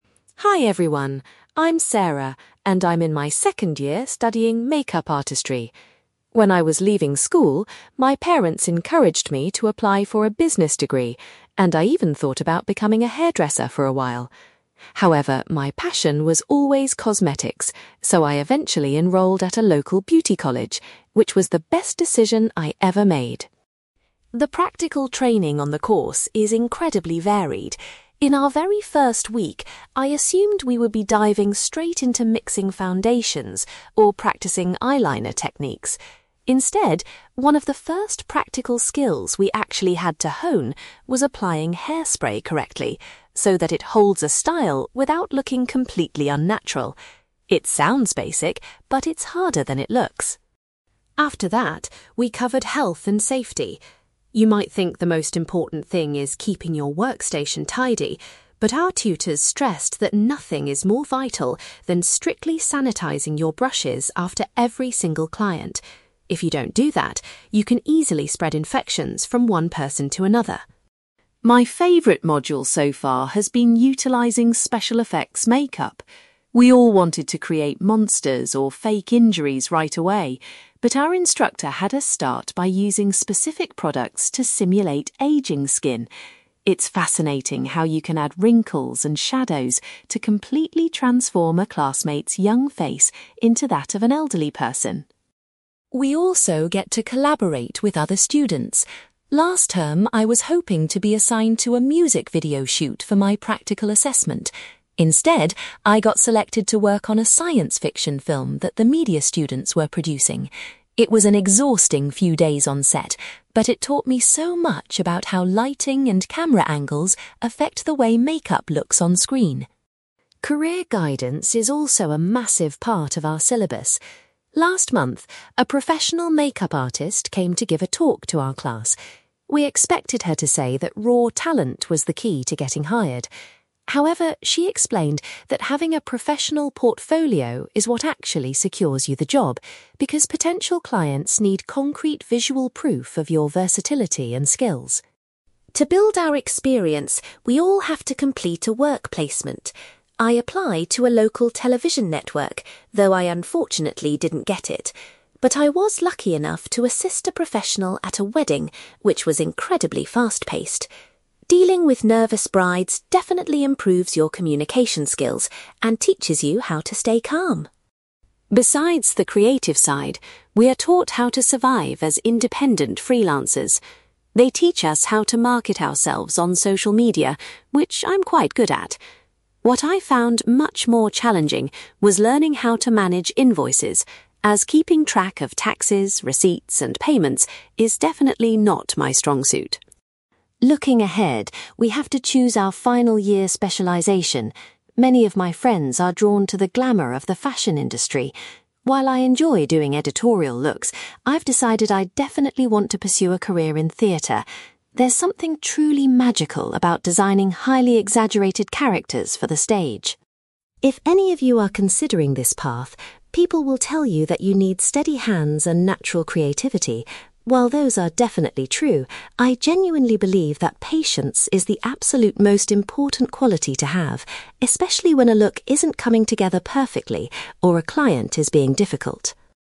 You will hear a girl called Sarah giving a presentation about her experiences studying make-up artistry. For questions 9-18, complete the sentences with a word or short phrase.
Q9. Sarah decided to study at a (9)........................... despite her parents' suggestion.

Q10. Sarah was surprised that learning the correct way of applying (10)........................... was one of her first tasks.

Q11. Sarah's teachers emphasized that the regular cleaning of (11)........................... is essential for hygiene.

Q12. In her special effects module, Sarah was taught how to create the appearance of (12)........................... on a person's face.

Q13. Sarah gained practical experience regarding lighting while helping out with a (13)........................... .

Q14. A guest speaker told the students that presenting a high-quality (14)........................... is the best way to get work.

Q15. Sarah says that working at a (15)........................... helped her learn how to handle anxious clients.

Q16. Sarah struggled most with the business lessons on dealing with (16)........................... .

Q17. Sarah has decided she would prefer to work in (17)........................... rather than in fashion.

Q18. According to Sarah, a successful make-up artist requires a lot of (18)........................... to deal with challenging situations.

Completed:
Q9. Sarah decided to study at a beauty college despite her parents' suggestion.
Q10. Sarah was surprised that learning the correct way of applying hairspray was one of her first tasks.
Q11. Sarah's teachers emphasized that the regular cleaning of brushes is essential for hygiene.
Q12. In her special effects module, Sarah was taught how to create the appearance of aging skin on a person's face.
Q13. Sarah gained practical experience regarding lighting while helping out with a science fiction film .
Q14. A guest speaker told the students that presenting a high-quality portfolio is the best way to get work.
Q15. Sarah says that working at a wedding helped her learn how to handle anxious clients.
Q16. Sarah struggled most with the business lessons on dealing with invoices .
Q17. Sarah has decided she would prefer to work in theatre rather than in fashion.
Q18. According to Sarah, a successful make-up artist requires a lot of patience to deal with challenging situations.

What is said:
Sarah: Hi everyone, I'm Sarah, and I'm in my second year studying make-up artistry. When I was leaving school, my parents encouraged me to apply for a business degree, and I even thought about becoming a hairdresser for a while. However, my passion was always cosmetics, so I eventually enrolled at a local beauty college, which was the best decision I ever made.
The practical training on the course is incredibly varied. In our very first week, I assumed we would be diving straight into mixing foundations or practicing eyeliner techniques. Instead, one of the first practical skills we actually had to hone was applying hairspray correctly, so that it holds a style without looking completely unnatural. It sounds basic, but it's harder than it looks!
After that, we covered health and safety. You might think the most important thing is keeping your workstation tidy, but our tutors stressed that nothing is more vital than strictly sanitizing your brushes after every single client. If you don't do that, you can easily spread infections from one person to another.
My favourite module so far has been utilizing special effects make-up. We all wanted to create monsters or fake injuries right away. But our instructor had us start by using specific products to simulate aging skin. It's fascinating how you can add wrinkles and shadows to completely transform a classmate's young face into that of an elderly person.
We also get to collaborate with other students. Last term, I was hoping to be assigned to a music video shoot for my practical assessment. Instead, I got selected to work on a science fiction film that the media students were producing. It was an exhausting few days on set, but it taught me so much about how lighting and camera angles affect the way make-up looks on screen.
Career guidance is also a massive part of our syllabus. Last month, a professional make-up artist came to give a talk to our class. We expected her to say that raw talent was the key to getting hired. However, she explained that having a professional portfolio is what actually secures you the job, because potential clients need concrete visual proof of your versatility and skills.
To build our experience, we all have to complete a work placement. I applied to a local television network, though I unfortunately didn't get it. But I was lucky enough to assist a professional at a wedding, which was incredibly fast-paced. Dealing with nervous brides definitely improves your communication skills and teaches you how to stay calm!
Besides the creative side, we are taught how to survive as independent freelancers. They teach us how to market ourselves on social media, which I'm quite good at. What I found much more challenging was learning how to manage invoices, as keeping track of taxes, receipts, and payments is definitely not my strong suit.
Looking ahead, we have to choose our final year specialization. Many of my friends are drawn to the glamour of the fashion industry. While I enjoy doing editorial looks, I've decided I definitely want to pursue a career in theatre. There's something truly magical about designing highly exaggerated characters for the stage.
If any of you are considering this path, people will tell you that you need steady hands and natural creativity. While those are definitely true, I genuinely believe that patience is the absolute most important quality to have, especially when a look isn't coming together perfectly or a client is being difficult.

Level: B2